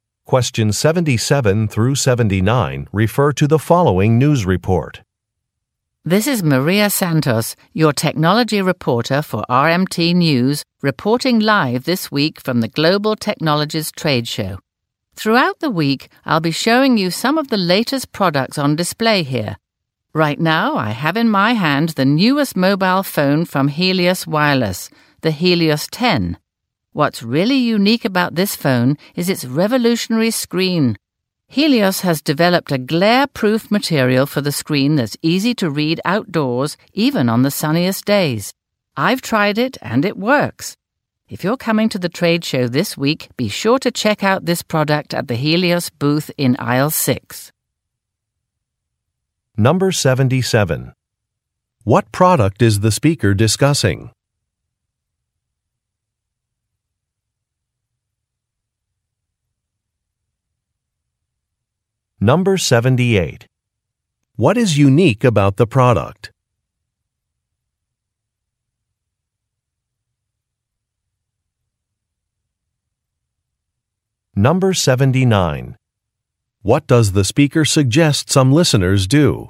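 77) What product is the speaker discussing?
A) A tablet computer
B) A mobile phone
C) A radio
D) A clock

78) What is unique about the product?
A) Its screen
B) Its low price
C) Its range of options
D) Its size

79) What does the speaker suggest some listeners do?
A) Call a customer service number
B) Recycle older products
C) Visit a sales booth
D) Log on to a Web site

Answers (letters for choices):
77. B
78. A
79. C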